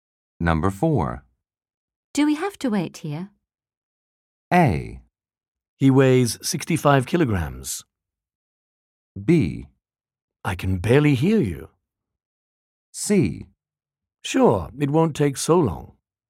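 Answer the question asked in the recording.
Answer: C: Sure, it won't take so long.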